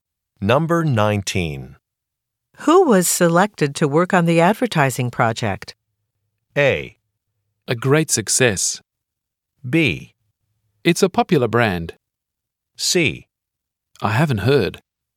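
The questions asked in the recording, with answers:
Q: Who was selected to work on the advertising project?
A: C: I haven't heard.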